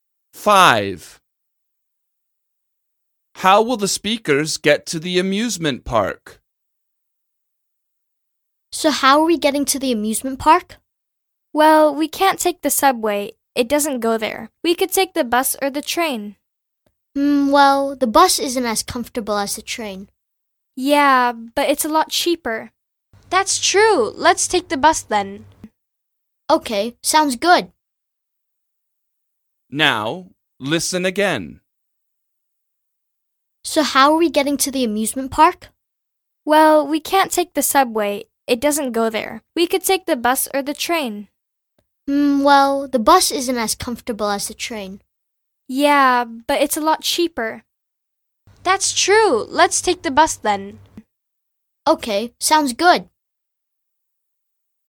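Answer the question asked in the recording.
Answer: by bus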